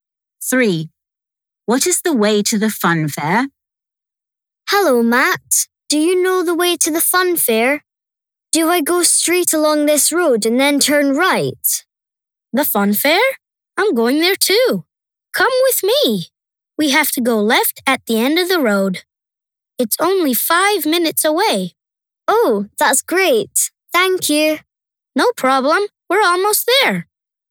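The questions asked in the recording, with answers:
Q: What is the way to the fun fair?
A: straight along the road, then left at the end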